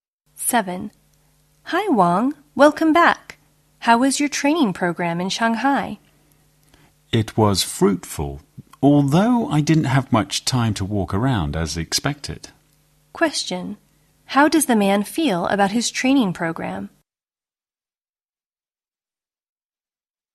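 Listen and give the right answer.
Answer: It was fruitful, though he had little time to walk around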